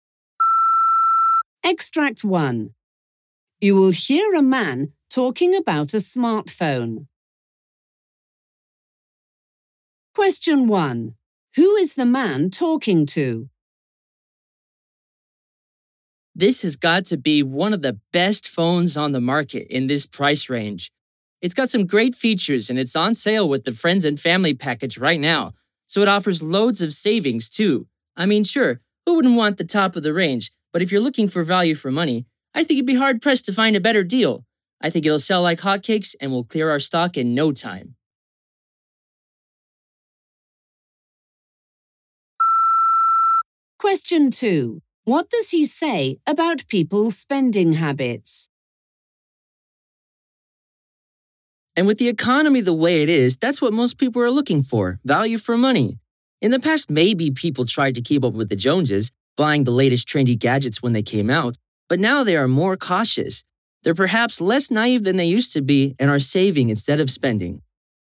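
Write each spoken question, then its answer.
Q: What does he say about people's spending habits?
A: They are more cautious now and save instead of spending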